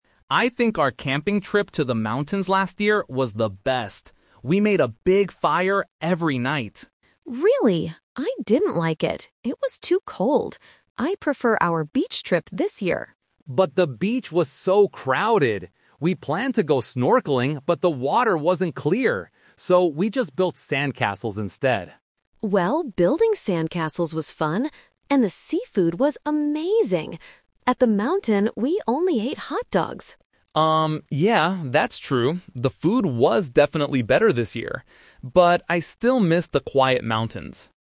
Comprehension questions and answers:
Listen to a conversation between a brother and sister about their family holidays and choose the correct answer (A, B, or C) for each question.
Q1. What did they do at the beach?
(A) They went snorkeling.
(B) They built sandcastles.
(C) They played volleyball.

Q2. Why didn't the girl like the mountain trip?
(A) It was too crowded.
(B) It was too cold.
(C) It was too dangerous.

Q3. What does the boy agree was better about the beach trip?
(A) The quiet places.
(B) The clear water.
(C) The food.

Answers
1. (B) They built sandcastles.
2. (B) It was too cold.
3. (C) The food.

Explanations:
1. The boy says, "So, we just built sandcastles instead." Option A is the trap: they "planned to go snorkeling", but they couldn't because the water wasn't clear. Option C is a plausible beach activity but is never mentioned.
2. The girl clearly states about the mountain trip, "I didn't like it. It was too cold." Option A is the trap: the word "crowded" is used by the boy to describe the beach, not the mountain. Option C is not mentioned in the audio.
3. The boy admits, "The food was definitely better this year," referring to the seafood at the beach compared to the hot dogs in the mountains. Option A is a trap: the mountains were quiet, not the beach. Option B is a trap: the boy explicitly says the beach water "wasn't clear."

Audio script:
Boy: I think our camping trip to the mountains last year was the best. We made a big fire every night.
Girl: Really? I didn't like it. I prefer our beach trip this year.
Boy: But the beach was so crowded! We planned to go snorkeling, but the water wasn't clear. So, we just built sandcastles instead.
Girl: Well, building sandcastles was fun! And the seafood was amazing. At the mountain, we only ate hot dogs.
Boy: Um, yeah, that's true. The food was definitely better this year. But I still miss the quiet mountains.

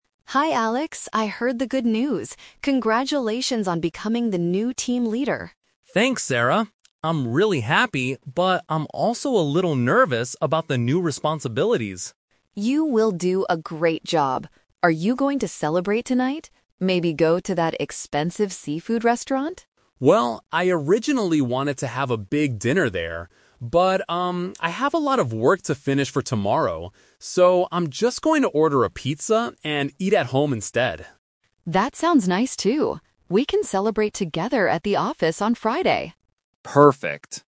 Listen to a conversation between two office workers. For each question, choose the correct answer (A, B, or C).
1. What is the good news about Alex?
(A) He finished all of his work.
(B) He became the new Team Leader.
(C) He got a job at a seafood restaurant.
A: (B) He became the new Team Leader.

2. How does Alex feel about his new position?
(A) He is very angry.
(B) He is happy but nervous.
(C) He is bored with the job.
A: (B) He is happy but nervous.

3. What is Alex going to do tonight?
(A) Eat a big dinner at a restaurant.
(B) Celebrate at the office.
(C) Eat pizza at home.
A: (C) Eat pizza at home.

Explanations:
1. Sarah says, "Congratulations on becoming the new Team Leader!" so this is the good news (Option B - Key). Option A is a trap because he mentions having work to finish later in the conversation. Option C is wrong because the restaurant is only mentioned as a place to celebrate.
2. Alex explicitly states his feelings: "I'm really happy, but I'm also a little nervous" (Option B - Key). Options A and C are not mentioned and do not match his positive but anxious tone.
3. Sarah suggests going to an expensive restaurant (Option A - Trap), and Alex says he "originally wanted" to do that. However, because he has work to do, he decides to "order a pizza and eat at home instead" (Option C - Key). Option B is a trap because they plan to celebrate at the office on Friday, not tonight.

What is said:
Sarah: Hi Alex! I heard the good news. Congratulations on becoming the new Team Leader!
Alex: Thanks, Sarah! I'm really happy, but I'm also a little nervous about the new responsibilities.
Sarah: You will do a great job! Are you going to celebrate tonight? Maybe go to that expensive seafood restaurant?
Alex: Well, I originally wanted to have a big dinner there. But, um, I have a lot of work to finish for tomorrow. So, I'm just going to order a pizza and eat at home instead.
Sarah: That sounds nice, too. We can celebrate together at the office on Friday!

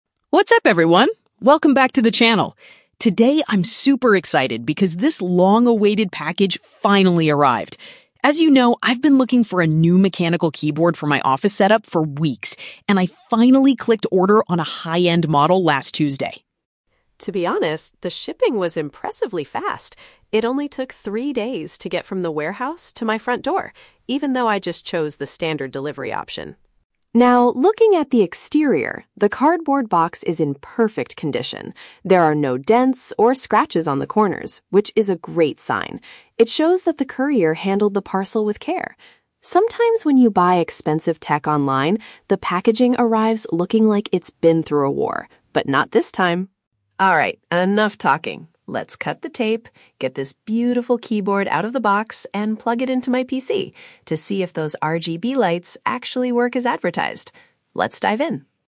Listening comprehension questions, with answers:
Listen to a Vlogger talking about his new purchase and choose the best answer (A, B, or C) for each question.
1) When did the Vlogger officially place the order for his keyboard?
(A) Exactly three days ago.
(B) On Tuesday of last week.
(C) After looking at different models for a month.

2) What surprised the Vlogger about the delivery process?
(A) The package arrived much quicker than he expected for a regular service.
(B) The courier called him multiple times before arriving at his front door.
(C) The shipping was free because he bought a very expensive model.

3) What does the Vlogger say about the condition of the box?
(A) It has several deep scratches on the corners from the long journey.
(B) It looks damaged, similar to packages that have "been through a war."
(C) It is completely undamaged and appears to have been handled gently.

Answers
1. (B) On Tuesday of last week.
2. (A) The package arrived much quicker than he expected for a regular service.
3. (C) It is completely undamaged and appears to have been handled gently.

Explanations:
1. The Vlogger says, "I finally clicked 'order' on a high-end model last Tuesday." Option B directly matches this information. Why the trap is wrong: Option (A) is a trap. Three days is the time it took for the shipping, not when he ordered it. Option (C) is a trap; he says he's been looking for "weeks," not a month.
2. The Vlogger mentions the shipping was "impressively fast" taking only "three days... even though I just chose the standard delivery option." Option A paraphrases "standard delivery" as "regular service." Why the trap is wrong: Option (B) and (C) are common online shopping experiences but are never mentioned in the audio.
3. He describes the box as being in "perfect condition" with "no dents or scratches," showing it was handled "with care." Option C uses synonyms: "undamaged" (perfect condition) and "handled gently" (with care). Why the trap is wrong: Option (B) is a trap. He mentions the phrase "been through a war" to describe other bad experiences he has had, but says "not this time!" Option (A) is the opposite of what he said.

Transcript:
Vlogger: What's up, everyone! Welcome back to the channel. Today, I'm super excited because this long-awaited package finally arrived. As you know, I've been looking for a new mechanical keyboard for my office setup for weeks, and I finally clicked "order" on a high-end model last Tuesday.
To be honest, the shipping was impressively fast. It only took three days to get from the warehouse to my front door, even though I just chose the standard delivery option.
Now, looking at the exterior, the cardboard box is in perfect condition. There are no dents or scratches on the corners, which is a great sign. It shows that the courier handled the parcel with care. Sometimes when you buy expensive tech online, the packaging arrives looking like it's been through a war, but not this time!
Alright, enough talking. Let's cut the tape, get this beautiful keyboard out of the box, and plug it into my PC to see if those RGB lights actually work as advertised. Let's dive in!

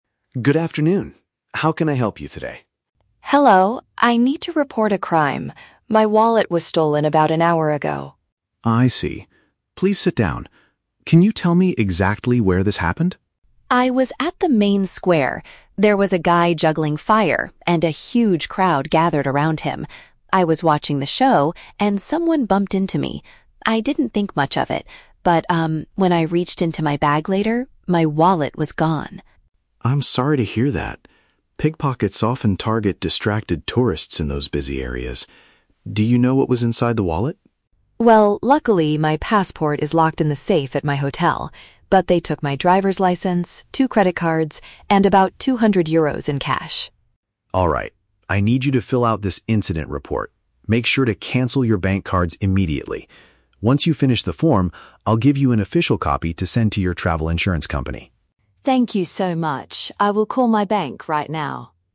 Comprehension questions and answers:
Listen to the conversation between a tourist and a police officer. Choose the correct answer (A, B, or C) for each question.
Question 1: What was the tourist doing when the crime occurred?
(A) She was walking back to her hotel room.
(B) She was watching an outdoor entertainment show.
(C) She was buying food at the main square.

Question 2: Which of the following items was stolen from the woman?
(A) Her passport and some cash.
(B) Her entire travel bag.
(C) Her identification and bank cards.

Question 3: Why does the officer give the tourist a copy of the report?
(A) To help her claim money from her insurance.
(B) So she can show it to her bank manager.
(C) To help her apply for a new driver's license.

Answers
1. (B) She was watching an outdoor entertainment show.
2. (C) Her identification and bank cards.
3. (A) To help her claim money from her insurance.

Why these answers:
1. The tourist says she was at the "main square" watching a "guy juggling fire" and the "show". This is paraphrased as an "outdoor entertainment show." Why the trap is wrong: Option (A) is a trap. The audio mentions her "hotel," but that is where her passport is, not where the crime happened. Option (C) is plausible, but she was watching a performance, not buying food.
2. The tourist lists the stolen items: a "driver's license" (which is a form of identification) and "credit cards" (bank cards). Why the trap is wrong: Option (A) is the main trap. The word "passport" is clearly spoken, but she says it is "locked in the safe", meaning it was NOT stolen. Option (B) is also a trap; she reached into her "bag", but only the wallet inside it was taken.
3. The officer tells her he will give her an official copy to "send to your travel insurance company." * Why the trap is wrong: Option (B) is a strong trap. The audio mentions "cancel your bank cards" and the tourist says she will "call my bank", but the document itself is for the insurance company, not the bank. Option (C) is plausible in real life but is not mentioned in the dialogue.

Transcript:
Officer: Good afternoon. How can I help you today?
Tourist: Hello. I need to report a crime. My wallet was stolen about an hour ago.
Officer: I see. Please sit down. Can you tell me exactly where this happened?
Tourist: I was at the main square. There was a guy juggling fire, and a huge crowd gathered around him. I was watching the show, and someone bumped into me. I didn't think much of it, but um, when I reached into my bag later, my wallet was gone!
Officer: I'm sorry to hear that. Pickpockets often target distracted tourists in those busy areas. Do you know what was inside the wallet?
Tourist: Well, luckily my passport is locked in the safe at my hotel. But they took my driver's license, two credit cards, and about 200 euros in cash.
I need you to fill out this incident report. Make sure to cancel your bank cards immediately. Once you finish the form, I'll give you an official copy to send to your travel insurance company.

